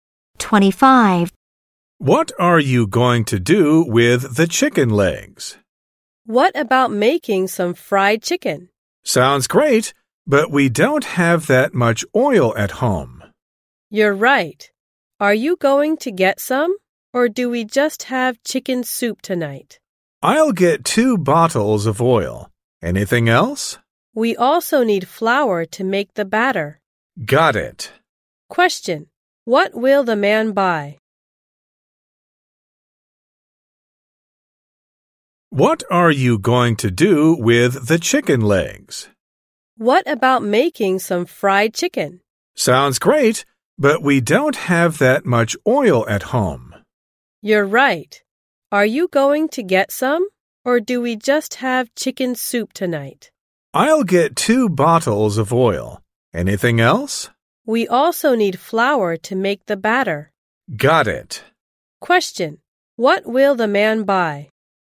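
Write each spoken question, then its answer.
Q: Question: What will the man buy?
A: Oil and flour.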